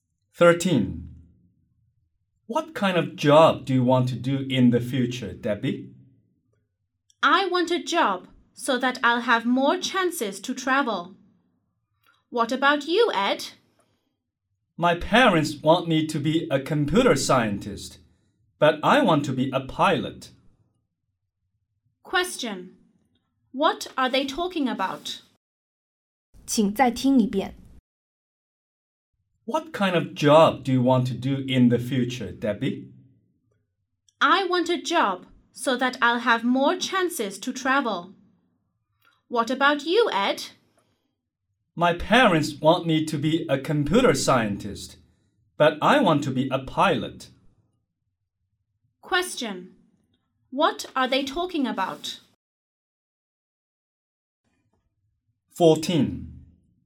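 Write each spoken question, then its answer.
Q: What are they talking about?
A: Their future jobs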